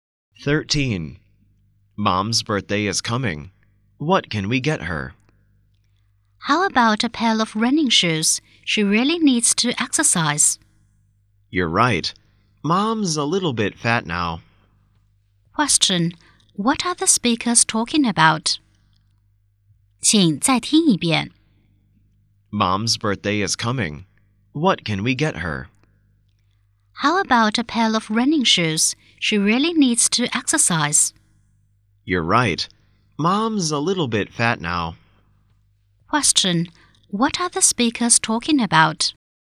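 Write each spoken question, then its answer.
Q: What are the speakers talking about?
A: A birthday present for Mom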